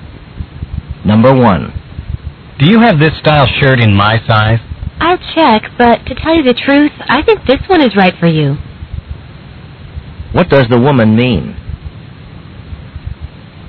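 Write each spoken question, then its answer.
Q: What does the woman mean?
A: The shirt he has is probably the right size for him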